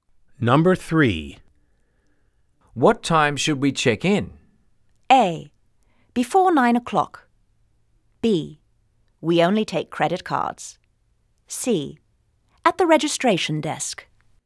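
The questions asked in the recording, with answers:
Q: What time should we check in?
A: A: Before 9 o'clock.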